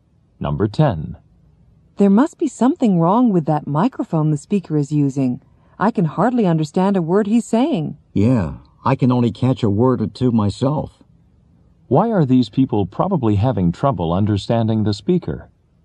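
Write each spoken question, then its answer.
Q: Why are these people probably having trouble understanding the speaker?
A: The microphone isn't working properly.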